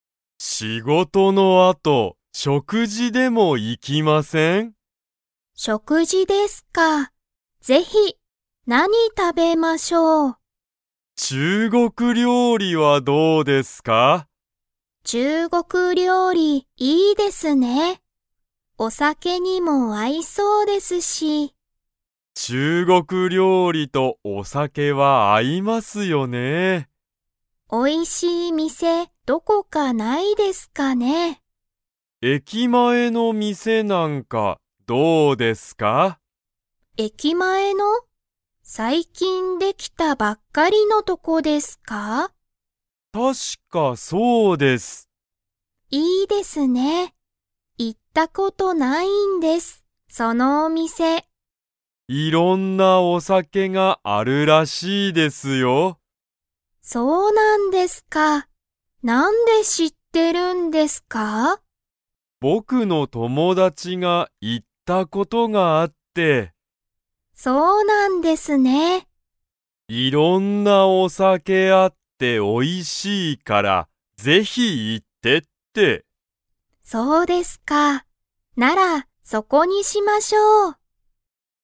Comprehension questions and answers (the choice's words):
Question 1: 佐藤さとうさんと田中たなかさんは、どこの店みせに行いきますか?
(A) アメリカ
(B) 会社かいしゃの中なか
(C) 目めの前まえ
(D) 駅前えきまえ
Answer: 駅前えきまえ

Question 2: 佐藤さとうさんは、その店みせに行いったことが 。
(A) ある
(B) ない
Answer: ない

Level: Level 3